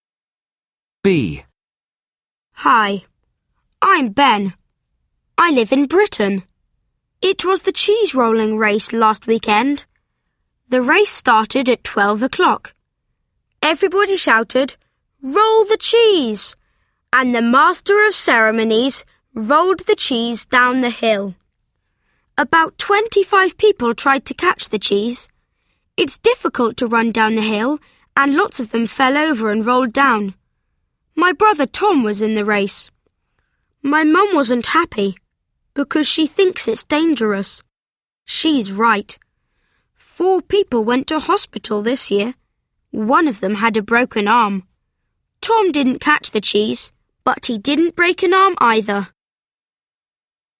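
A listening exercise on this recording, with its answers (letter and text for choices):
LISTEN CAREFULLY AND CHOOSE THE CORRECT ANSWER.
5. Where does Ben live?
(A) He lives in China.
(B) He lives in France.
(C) He lives in Ireland.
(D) He lives in Britain.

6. What time did the Cheese Rolling Race start?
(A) At half past twelve.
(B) At twelve o'clock.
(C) At eleven o'clock.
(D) At two o'clock.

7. Who was in the race?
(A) His brother Tom.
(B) His friend Tom.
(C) His cousin Tom.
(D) His mum.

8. How many people went to hospital?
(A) Twenty five people.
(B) Ten people.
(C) Five people.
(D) Four people.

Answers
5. (D) He lives in Britain.
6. (B) At twelve o'clock.
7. (A) His brother Tom.
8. (D) Four people.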